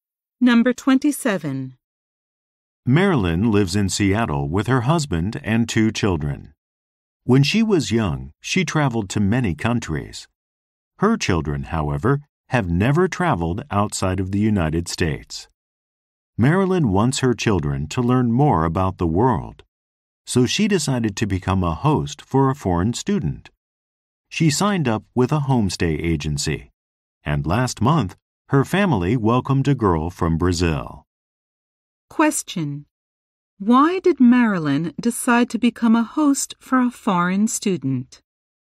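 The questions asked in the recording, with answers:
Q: Why did Marilyn decide to become a host for a foreign student?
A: She wants her children to learn more about the world.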